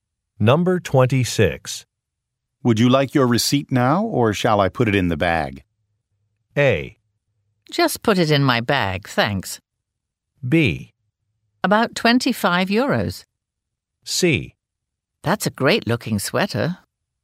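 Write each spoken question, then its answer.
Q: Would you like your receipt now, or shall I put it in the bag?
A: A: Just put it in my bag, thanks.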